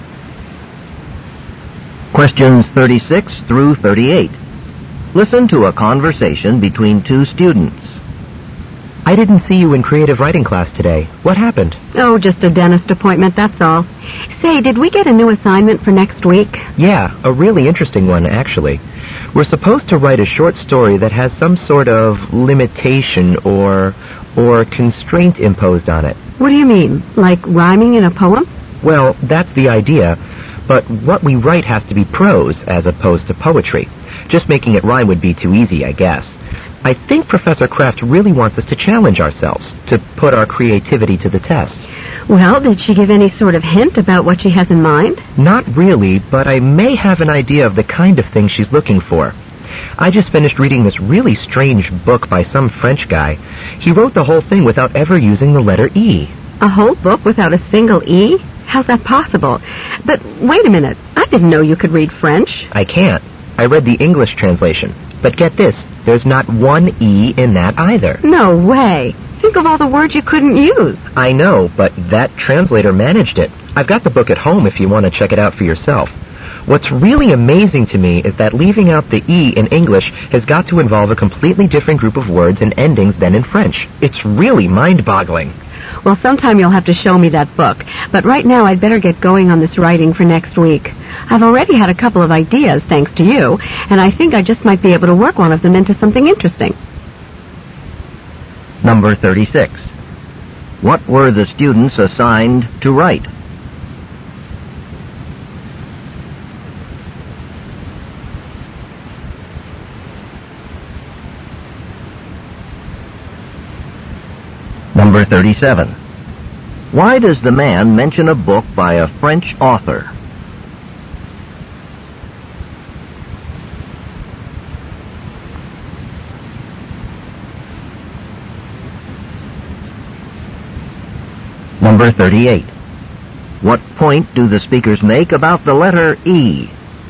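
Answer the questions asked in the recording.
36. A short prose story with a constraint imposed on it
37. As an example of writing with a constraint
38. Leaving it out is hard and needs different words in English than in French.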